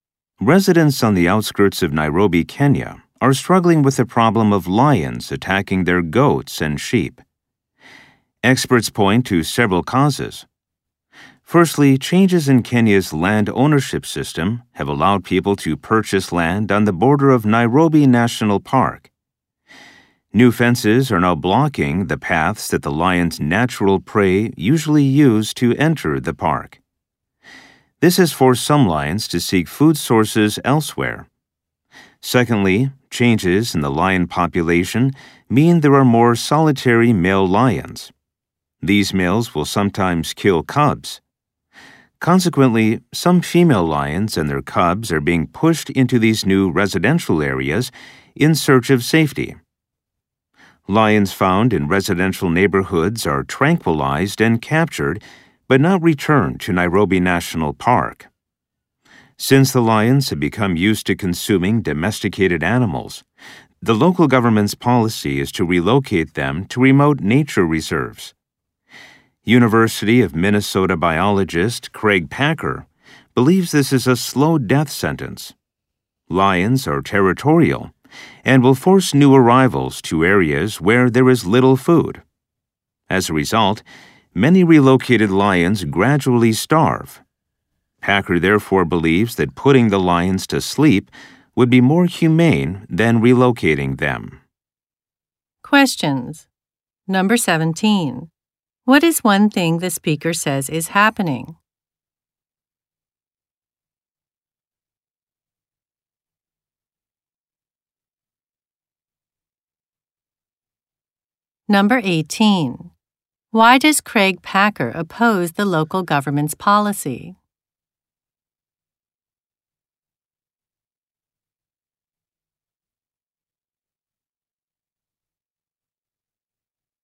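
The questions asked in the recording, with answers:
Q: Why does Craig Packer oppose the local government's policy?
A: Relocated lions are forced by territorial lions into areas with little food and slowly starve.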